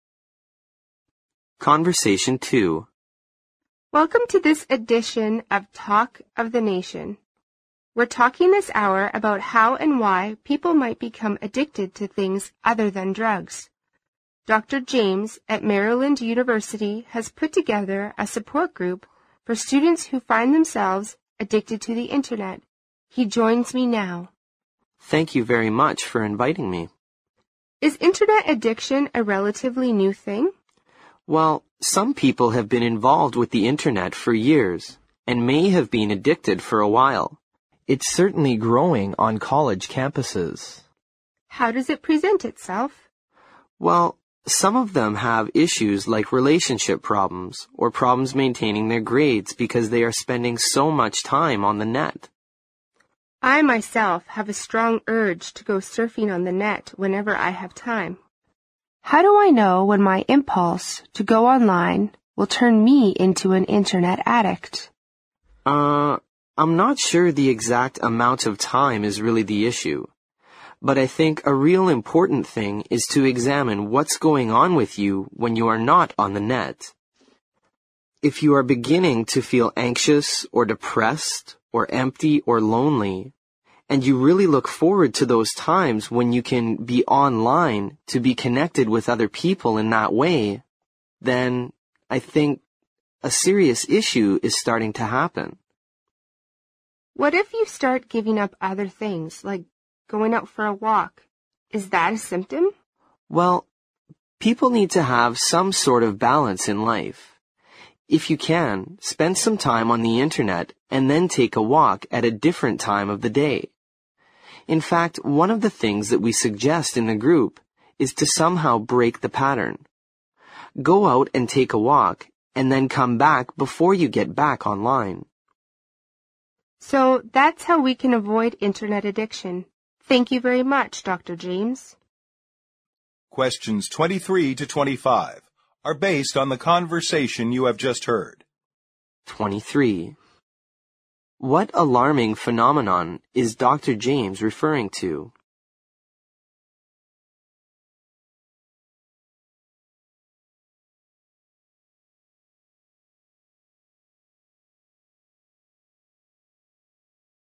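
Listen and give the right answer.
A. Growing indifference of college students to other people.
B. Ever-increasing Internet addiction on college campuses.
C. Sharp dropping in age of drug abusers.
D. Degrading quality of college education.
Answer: B. Ever-increasing Internet addiction on college campuses.

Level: 六级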